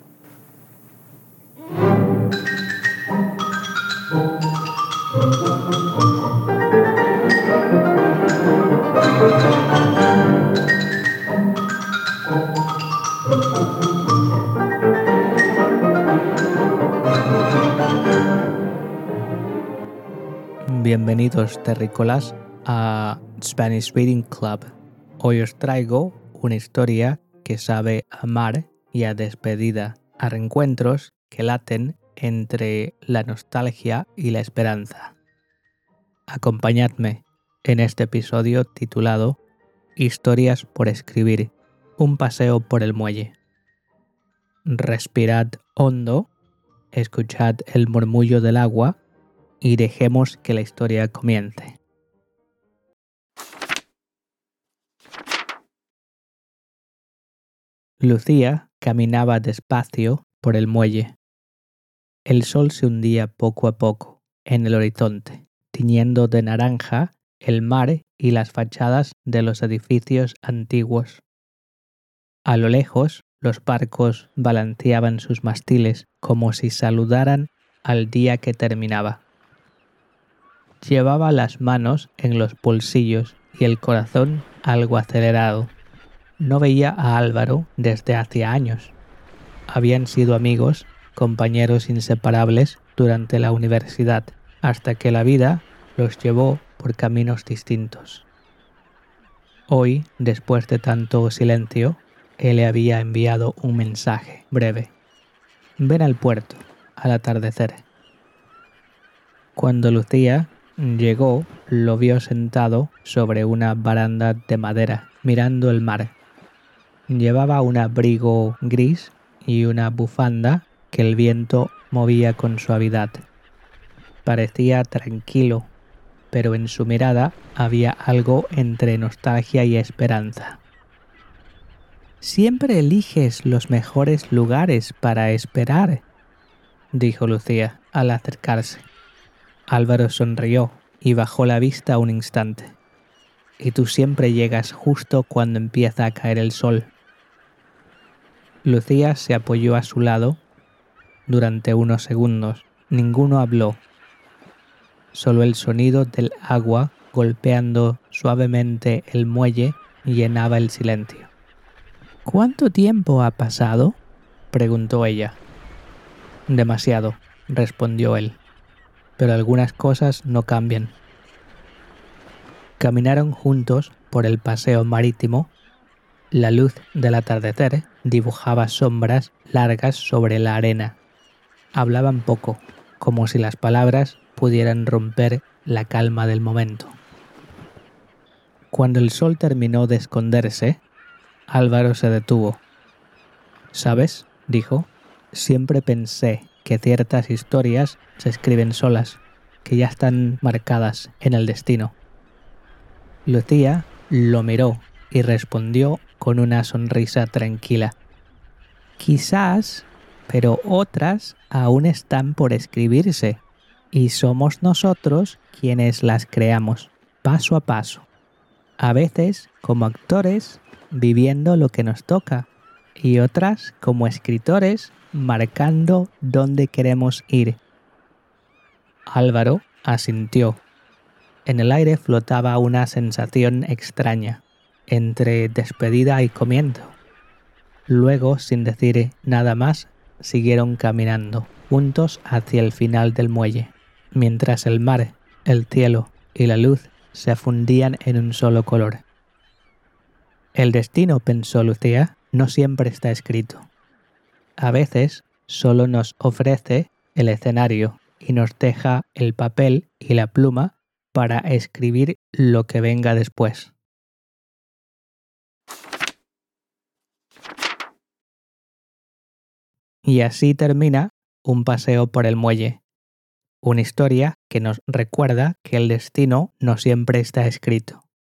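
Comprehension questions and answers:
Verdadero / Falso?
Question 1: Álvaro le envió un mensaje a Lucía para que fuera al puerto. ( )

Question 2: Lucía 1 despacio por el muelle.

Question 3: El sol 2 poco a poco en el horizonte, tiñendo de naranja el mar y los edificios antiguos.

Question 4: ¿Qué llevaba Álvaro cuando Lucía lo vio?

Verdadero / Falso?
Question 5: El sol se estaba escondiendo mientras ellos caminaban. ( )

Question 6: Lucía y Álvaro NO se conocían antes de verse en el muelle. ( )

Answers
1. Verdadero
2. caminaba
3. se hundía
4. Un abrigo gris y una bufanda
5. Verdadero
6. Falso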